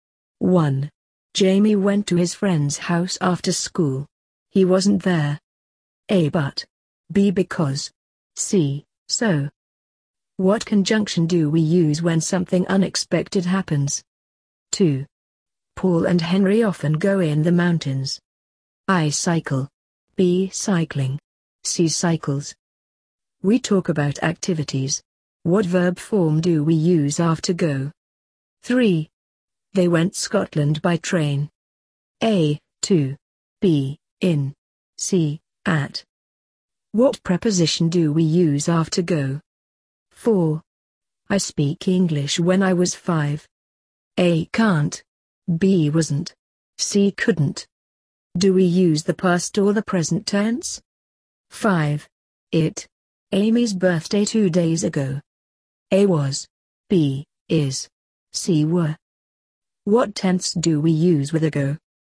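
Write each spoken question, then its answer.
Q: Jamie went to his friend's house after school. He wasn't there. A. But. B. Because. C. So.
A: A: But

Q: Paul and Henry often go in the mountains. I. Cycle. B. Cycling. C. Cycles.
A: B: Cycling

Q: They went Scotland by train. A. To. B. In. C. At.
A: A: To

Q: I speak English when I was 5. A. Can't. B. Wasn't. C. Couldn't.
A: C: Couldn't

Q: It. Amy's birthday 2 days ago. A. Was. B. Is. C. Were.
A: A: Was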